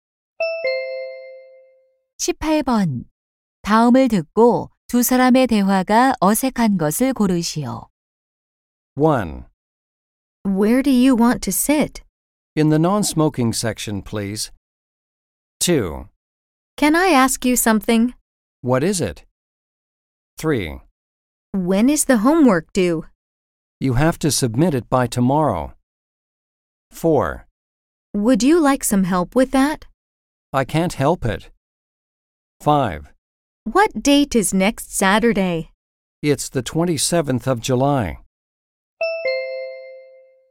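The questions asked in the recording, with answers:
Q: 다음을 듣고 두 사람의 대화가 어색한 것을 고르시오.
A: 4: Would you like some help with that? / I can't help it.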